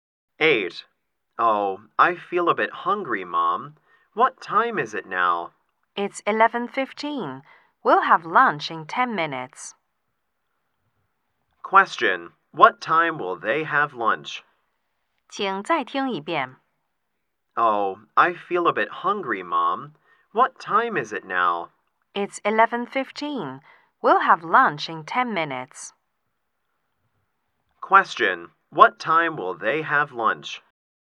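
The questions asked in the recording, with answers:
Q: what time will they have lunch?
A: At 11:25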